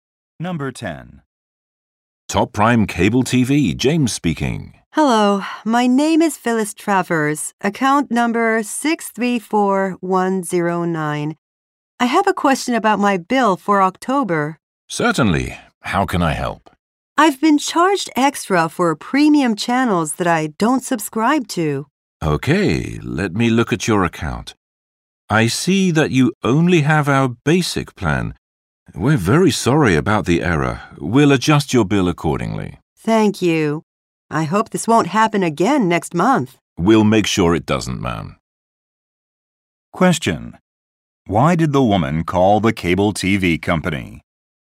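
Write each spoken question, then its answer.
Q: Why did the woman call the cable TV company?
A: She was charged for premium channels she doesn't subscribe to.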